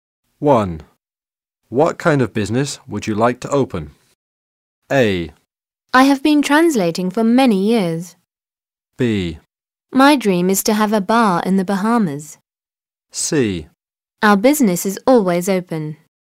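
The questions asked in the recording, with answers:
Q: What kind of business would you like to open?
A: B: My dream is to have a bar in the Bahamas.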